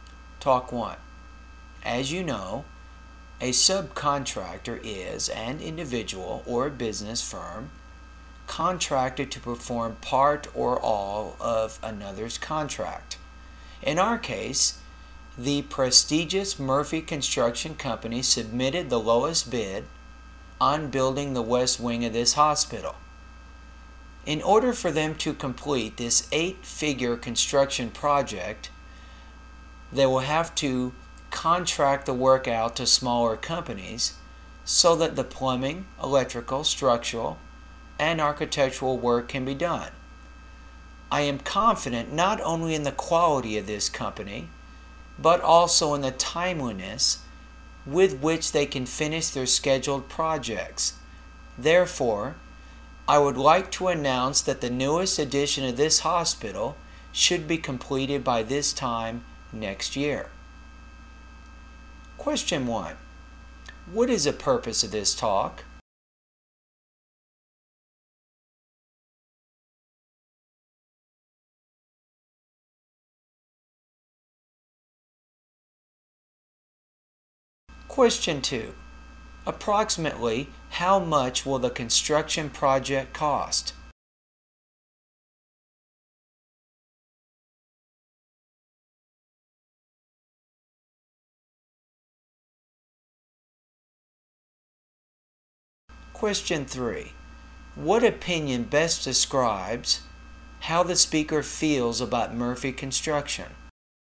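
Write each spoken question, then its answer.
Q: Approximately how much will the construction project cost?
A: An eight-figure sum (tens of millions)

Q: What opinion best describes how the speaker feels about Murphy Construction?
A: Confident in its quality and timeliness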